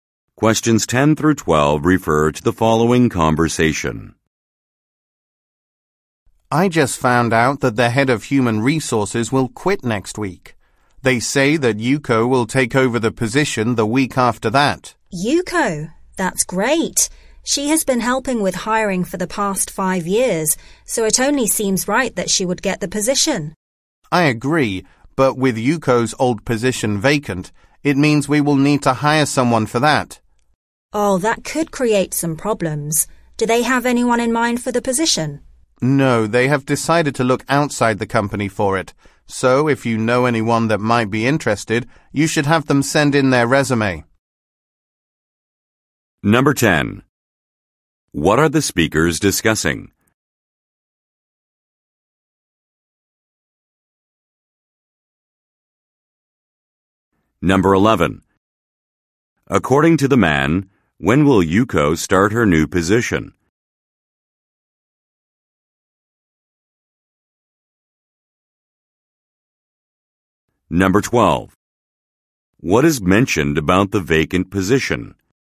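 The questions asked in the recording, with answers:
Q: According to the man, when will Yuko start her new position?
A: In two weeks

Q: What is mentioned about the vacant position?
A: They will hire someone from outside the company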